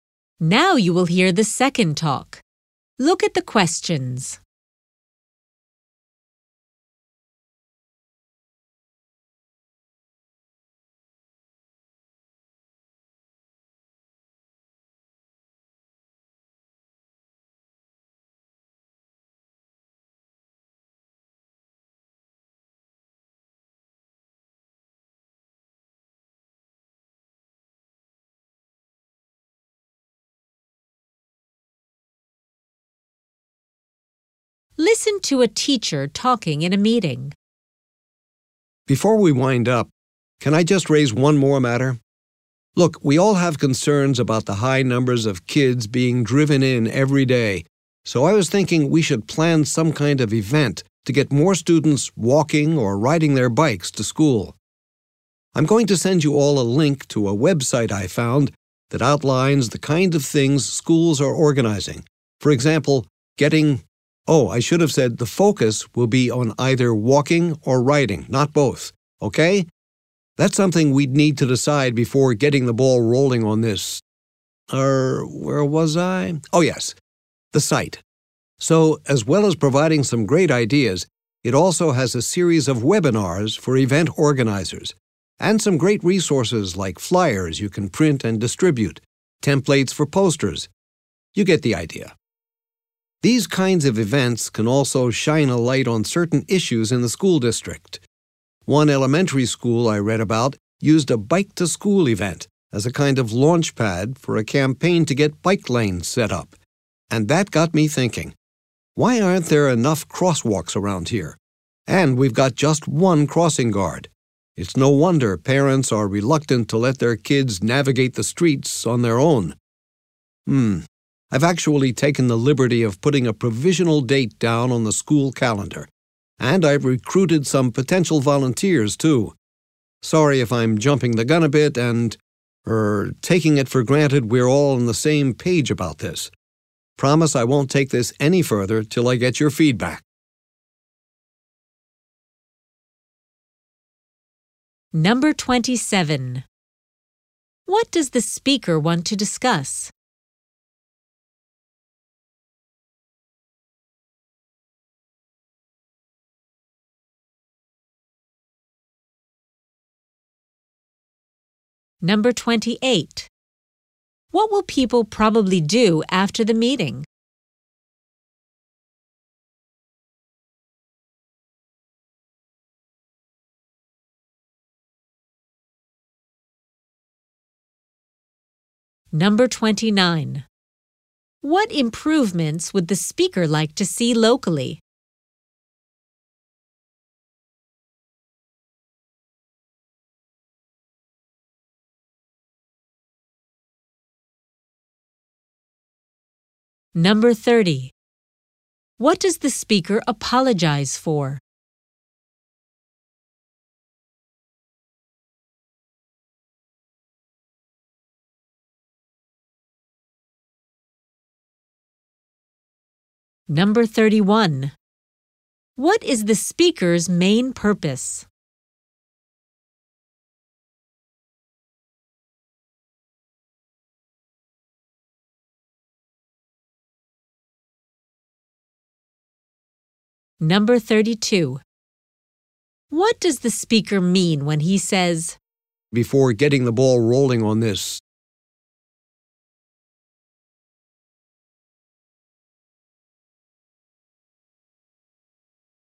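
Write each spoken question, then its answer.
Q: What does the speaker want to discuss?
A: Planning an event to get students walking or biking to school

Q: What improvements would the speaker like to see locally?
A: More crosswalks and crossing guards

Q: What does the speaker apologize for?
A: Acting before getting everyone's agreement

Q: What is the speaker's main purpose?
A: To propose a walk- or bike-to-school event

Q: What does the speaker mean when he says,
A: Before starting to organize the event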